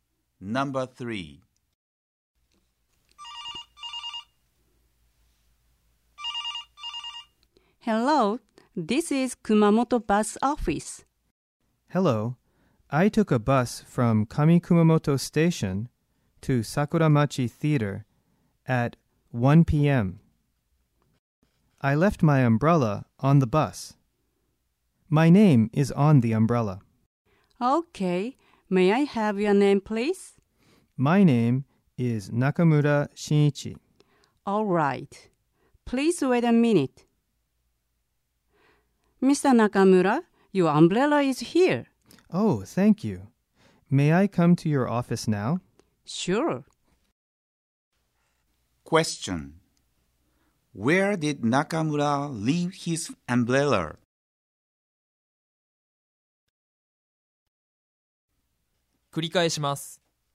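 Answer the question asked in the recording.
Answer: On the bus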